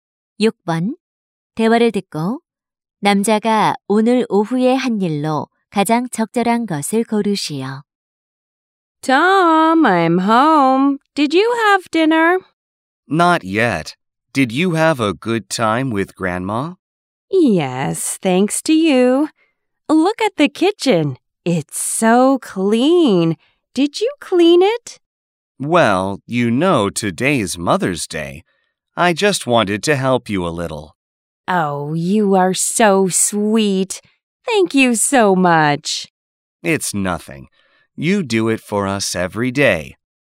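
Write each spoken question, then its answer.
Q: 대화를 듣고 남자가 오늘 오후에 한 일로 가장 적절한 것을 고르시오.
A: 부엌 청소하기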